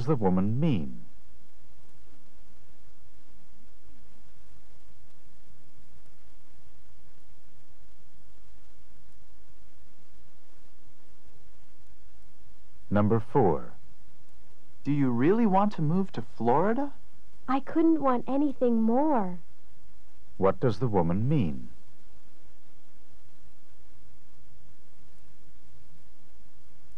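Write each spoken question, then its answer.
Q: What does the woman mean?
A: She really wants to move to Florida.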